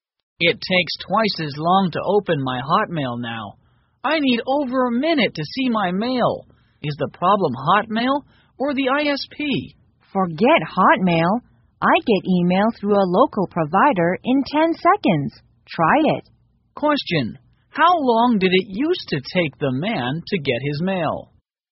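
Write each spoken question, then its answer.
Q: how long did it used to take the man to get his mail?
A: about half a minute (30 seconds)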